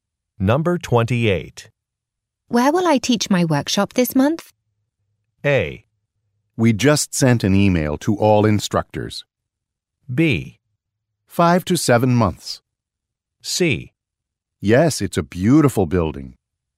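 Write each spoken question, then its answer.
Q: Where will I teach my workshop this month?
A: A: We just sent an email to all instructors.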